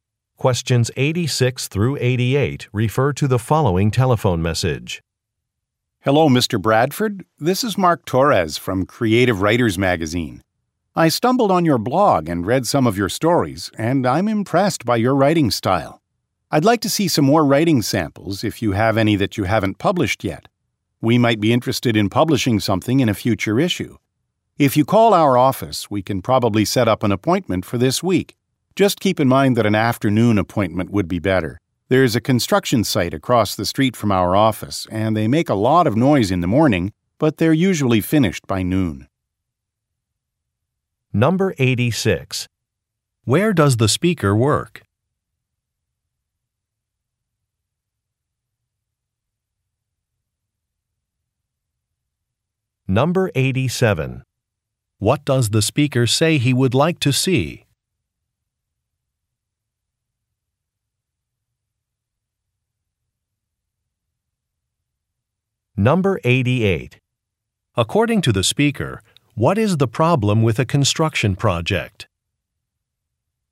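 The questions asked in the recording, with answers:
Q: Where does the speaker work?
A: At Creative Writers Magazine

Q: What does the speaker say he would like to see?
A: More unpublished writing samples

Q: According to the speaker, what is the problem with a construction project?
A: It makes a lot of noise in the morning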